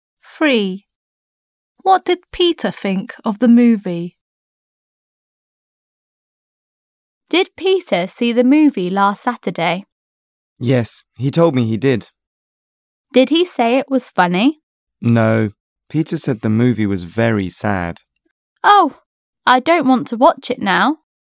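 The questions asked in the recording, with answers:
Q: What did Peter think of the movie?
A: It was very sad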